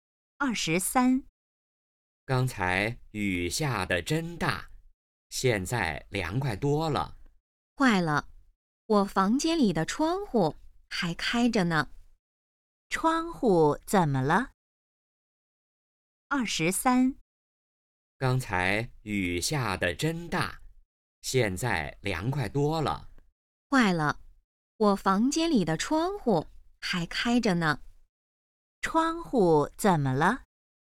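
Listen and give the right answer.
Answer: 还开着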